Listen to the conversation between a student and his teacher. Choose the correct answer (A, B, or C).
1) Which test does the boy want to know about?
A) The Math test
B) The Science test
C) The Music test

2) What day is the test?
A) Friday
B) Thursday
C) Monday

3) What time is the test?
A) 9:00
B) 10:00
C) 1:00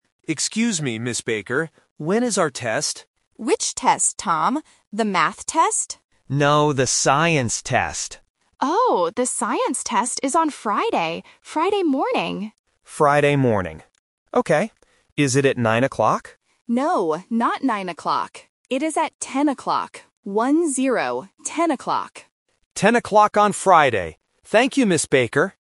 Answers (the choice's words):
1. The Science test
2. Friday
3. 10:00

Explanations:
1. The teacher asks if he means the "Math test", but the boy says "No". He clearly says he is asking about the "Science test". Option (A) is the trap (mentioned but rejected). Option (C) is not mentioned.
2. The teacher clearly says the test is on Friday. Option (B) is a common A1 phonetic trap (Friday vs. Thursday).
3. The boy asks if the test is at 9:00, but the teacher says, "No, not nine o'clock. It is at ten o'clock." Option (A) is the trap because it was mentioned but rejected. Option (C) is a phonetic trap because the teacher says "one-zero".

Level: A1